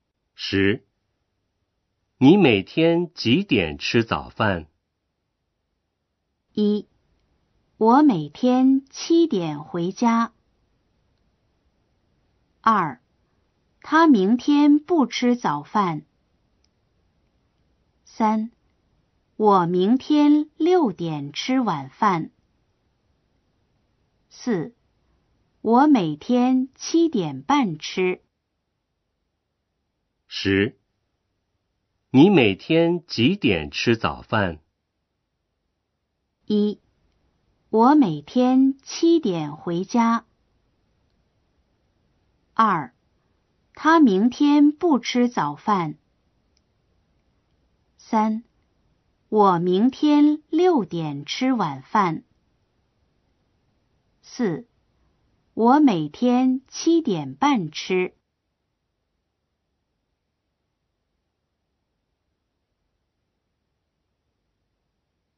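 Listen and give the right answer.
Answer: 4: 我每天七点半吃。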